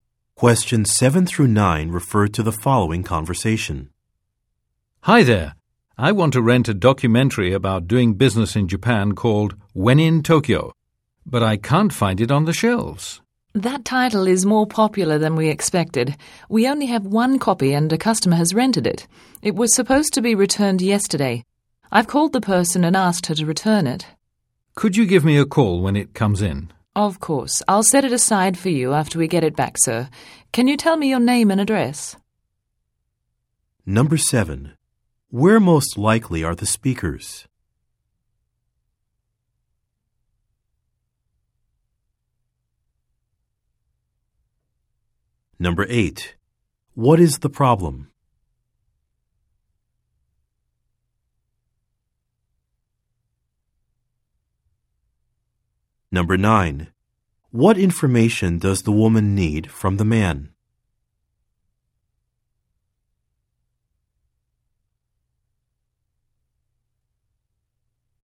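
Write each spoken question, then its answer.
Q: Where most likely are the speakers?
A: At a video rental store

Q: What is the problem?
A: The only copy of the documentary is rented out and was not returned on time

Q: What information does the woman need from the man?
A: His name and address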